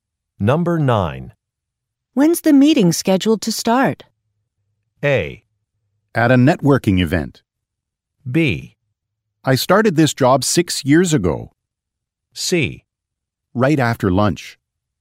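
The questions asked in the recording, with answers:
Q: When's the meeting scheduled to start?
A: C: Right after lunch.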